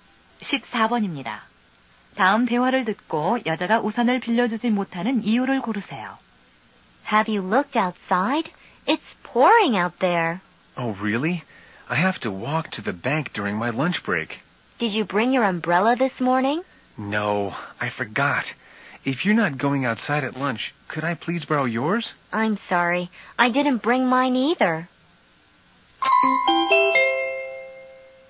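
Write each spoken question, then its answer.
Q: 다음 대화를 듣고 여자가 우산을 빌려주지 못하는 이유를 고르세요.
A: 자신도 우산을 가져오지 않아서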